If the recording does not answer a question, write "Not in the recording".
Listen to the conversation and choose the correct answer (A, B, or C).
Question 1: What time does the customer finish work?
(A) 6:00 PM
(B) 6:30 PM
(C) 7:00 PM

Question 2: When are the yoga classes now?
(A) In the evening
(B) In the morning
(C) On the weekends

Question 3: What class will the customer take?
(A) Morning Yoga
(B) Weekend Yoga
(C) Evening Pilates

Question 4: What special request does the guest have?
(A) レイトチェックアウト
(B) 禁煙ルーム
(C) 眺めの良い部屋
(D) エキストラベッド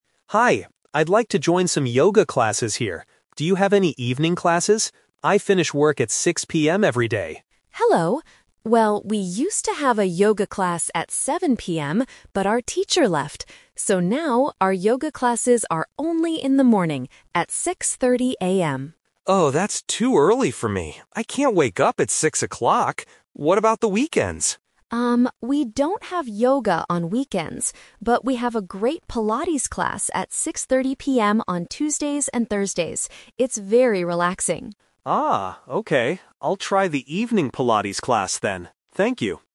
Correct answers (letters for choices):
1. A
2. B
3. C
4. Not in the recording

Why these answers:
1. The customer clearly says, "I finish work at 6:00 PM every day." Option B (6:30 PM) is a trap because it is the time for the new Pilates class. Option C (7:00 PM) is a trap because it was the old time for the yoga class.
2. The receptionist says, "So now, our yoga classes are only in the morning, at 6:30 AM." Option A (In the evening) is a trap because they used to have evening yoga classes. Option C (On the weekends) is a trap because the receptionist explicitly says, "we don't have yoga on weekends."
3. The customer decides at the end, "I'll try the evening Pilates class then." Option A (Morning Yoga) is a trap because she says 6:30 AM is "too early" for her. Option B is a trap because weekend yoga does not exist at this gym.